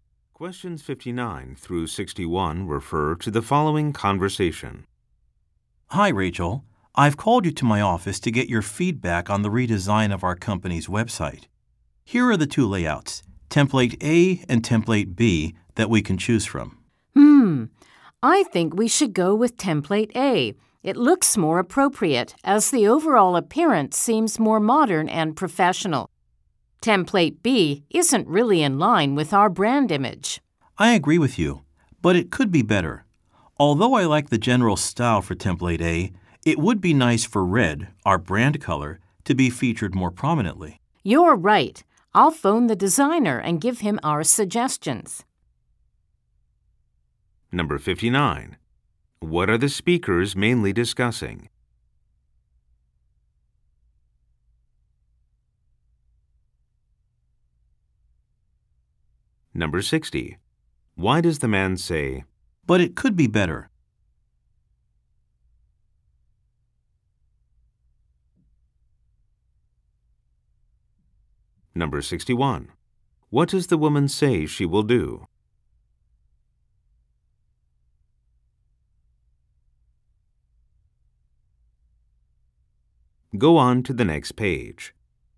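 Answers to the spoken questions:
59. The redesign of the company website
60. He wants the brand color red featured more prominently
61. Phone the designer with their suggestions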